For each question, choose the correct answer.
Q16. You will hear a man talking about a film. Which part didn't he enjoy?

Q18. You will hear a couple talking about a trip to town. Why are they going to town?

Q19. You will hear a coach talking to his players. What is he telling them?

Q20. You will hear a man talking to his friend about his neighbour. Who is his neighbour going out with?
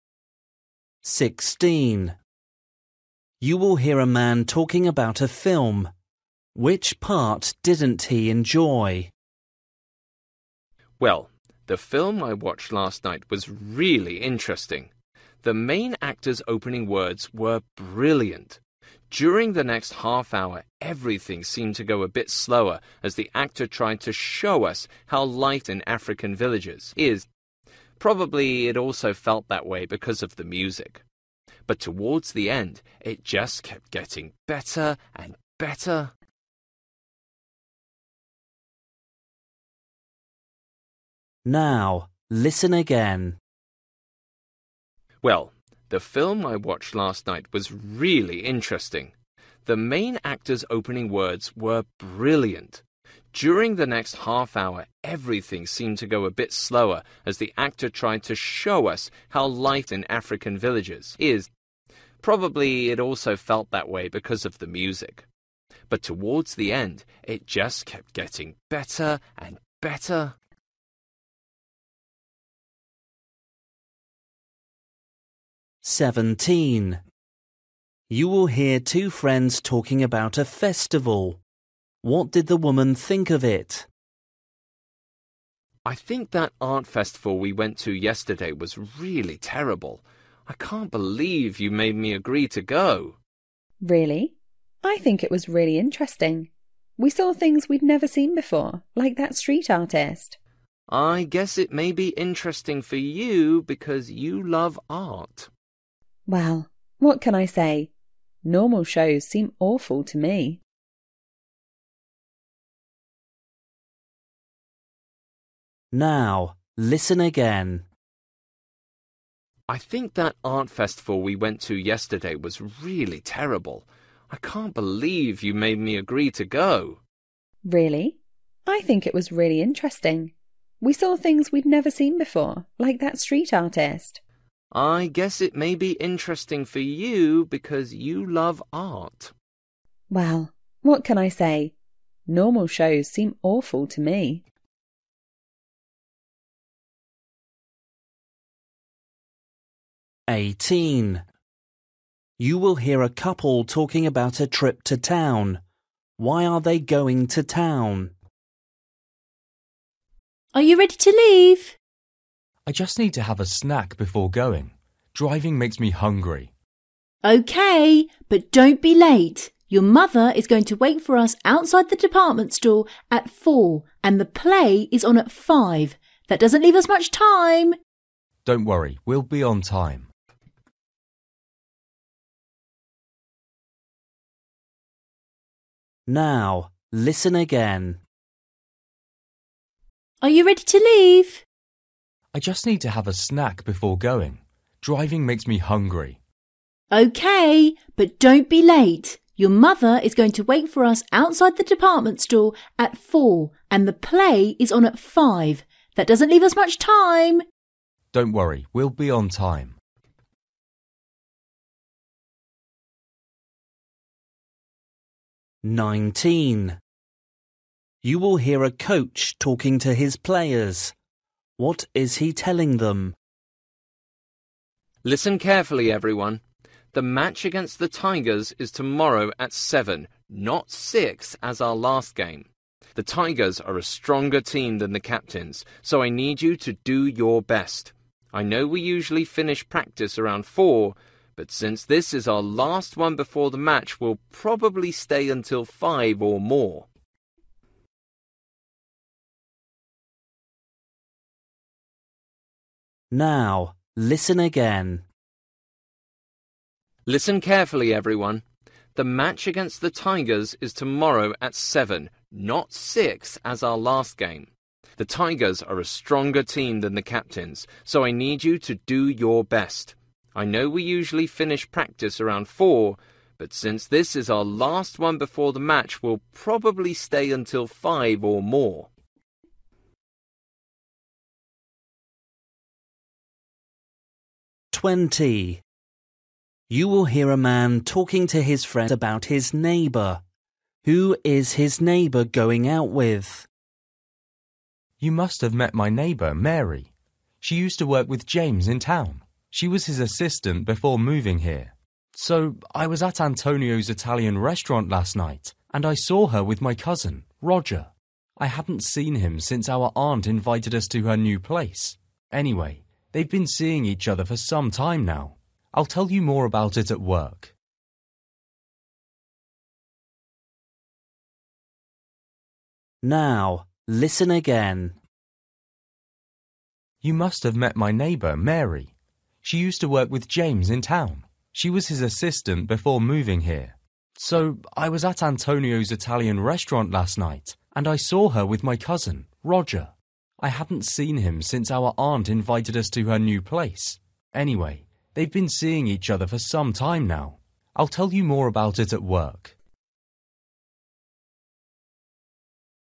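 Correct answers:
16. the middle part
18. to see a play
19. practice will finish later than usual
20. his cousin Roger

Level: Luyện nghe trình độ A2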